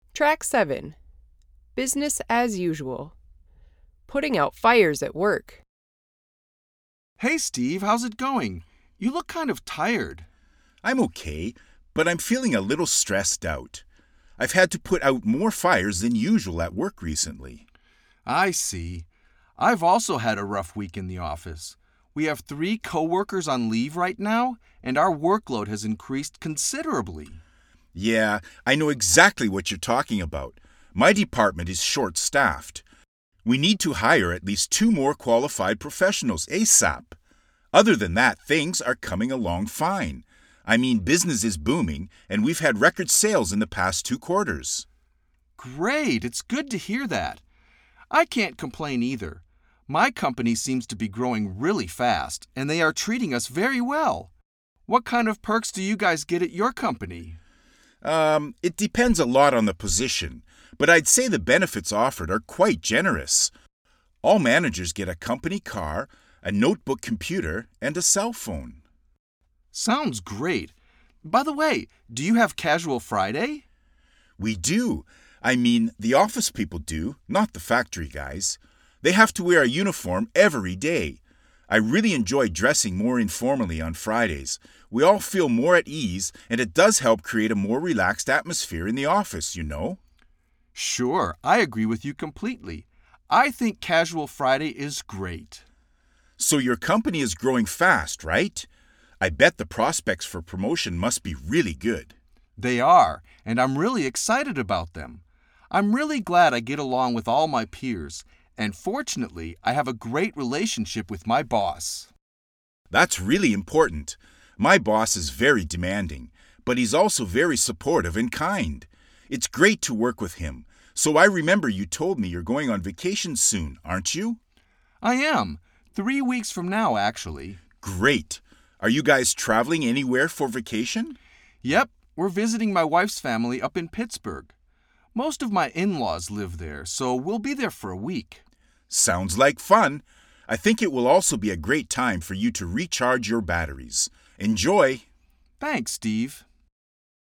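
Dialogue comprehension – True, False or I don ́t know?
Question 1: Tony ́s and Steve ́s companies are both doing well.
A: True

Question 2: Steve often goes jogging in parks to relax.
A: I don ́t know

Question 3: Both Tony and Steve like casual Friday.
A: True

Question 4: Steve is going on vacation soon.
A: False

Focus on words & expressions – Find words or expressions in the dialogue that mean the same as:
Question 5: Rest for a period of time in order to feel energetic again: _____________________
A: recharge your batteries

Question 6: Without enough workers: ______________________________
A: short staffed

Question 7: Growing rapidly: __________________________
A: booming

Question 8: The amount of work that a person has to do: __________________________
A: workload

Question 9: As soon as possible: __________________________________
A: ASAP

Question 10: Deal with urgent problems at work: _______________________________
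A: put out fires

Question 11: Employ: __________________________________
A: hire

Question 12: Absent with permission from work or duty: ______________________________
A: on leave

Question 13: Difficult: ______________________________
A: rough

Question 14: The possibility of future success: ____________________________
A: prospects

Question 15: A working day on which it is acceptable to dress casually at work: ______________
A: casual Friday

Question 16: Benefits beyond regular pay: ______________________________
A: perks

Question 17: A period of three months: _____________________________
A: quarter

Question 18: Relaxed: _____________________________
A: at ease

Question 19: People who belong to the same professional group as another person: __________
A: peers

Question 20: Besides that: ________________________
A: other than that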